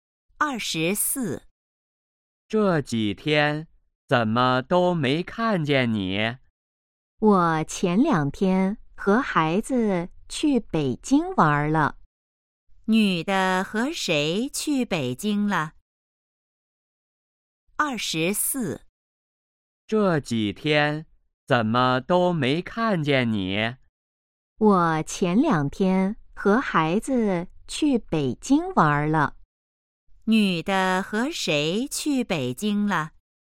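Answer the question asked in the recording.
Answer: 和孩子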